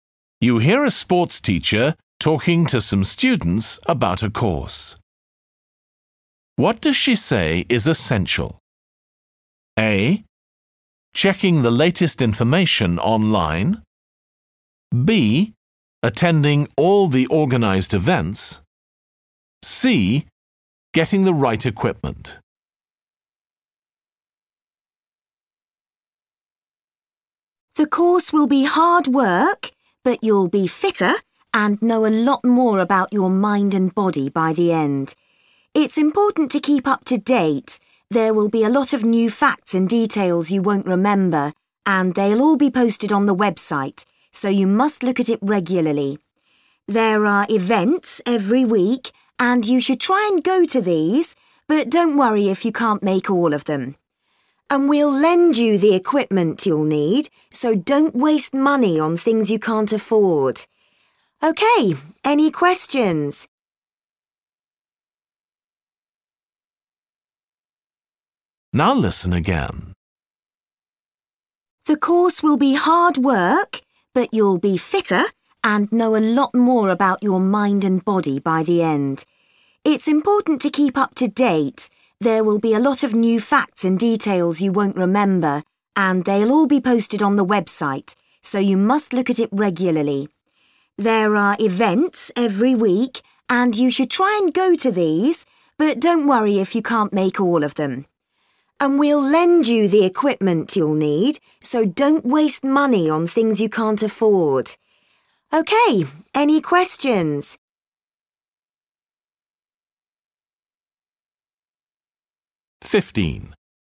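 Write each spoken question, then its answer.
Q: What does she say is essential?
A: A: Checking the latest information online.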